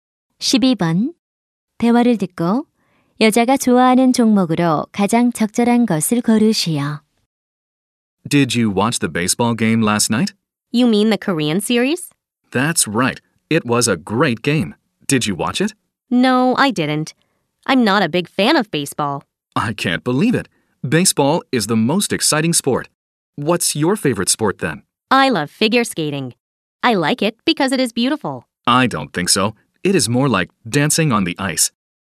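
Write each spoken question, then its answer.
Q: 대화를 듣고 여자가 좋아하는 종목으로 가장 적절한 것을 고르시오.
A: 피겨 스케이팅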